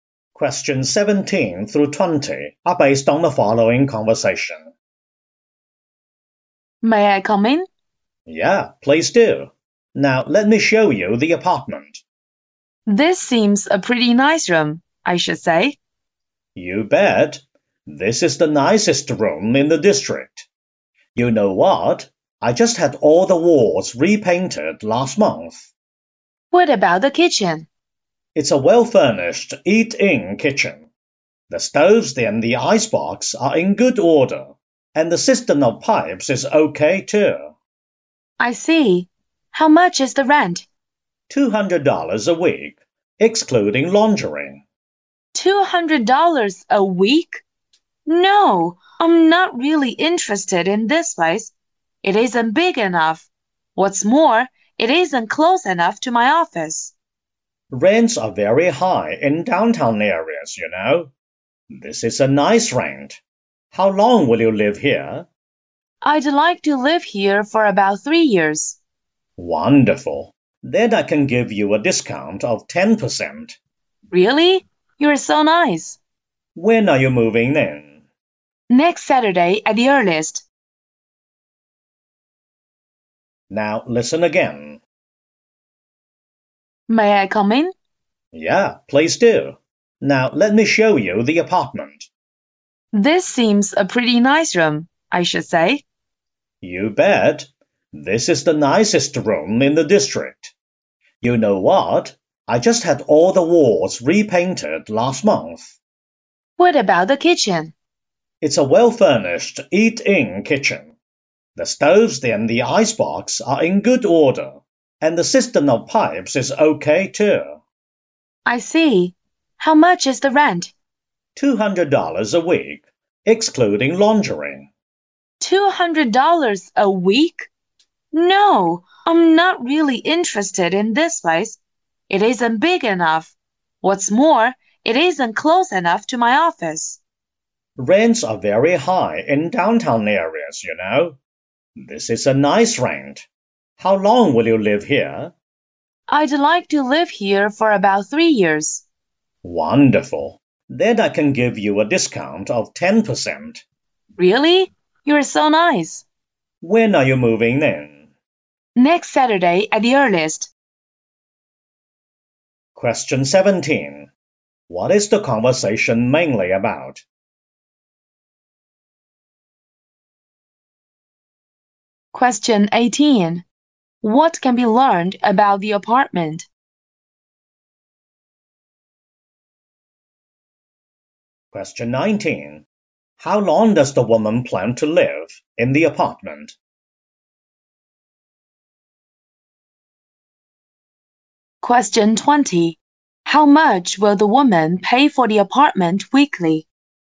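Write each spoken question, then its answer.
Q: What is the conversation mainly about?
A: Renting an apartment

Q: How long does the woman plan to live in the apartment?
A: About 3 years

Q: How much will the woman pay for the apartment weekly?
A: $180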